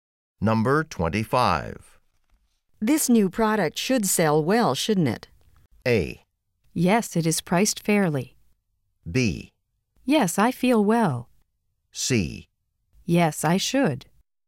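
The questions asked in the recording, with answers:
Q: This new product should sell well, shouldn't it?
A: A: Yes, it is priced fairly.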